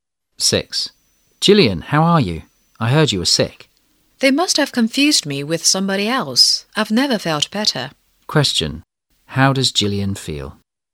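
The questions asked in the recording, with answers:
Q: How does Gillian feel?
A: Very well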